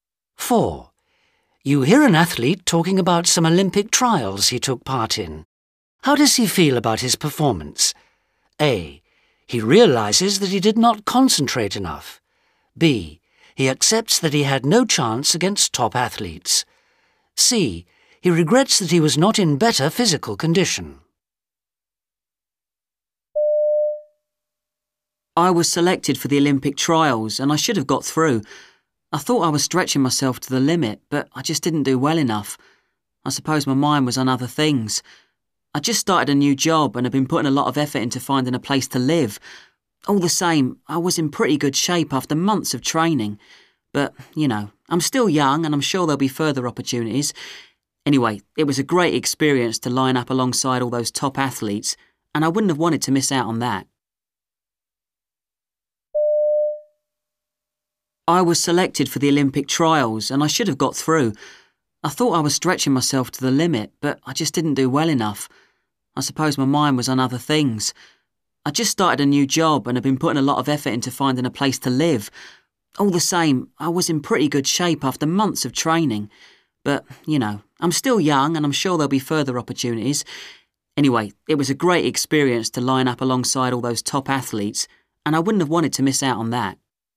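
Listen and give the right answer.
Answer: A: He realizes that he did not concentrate enough.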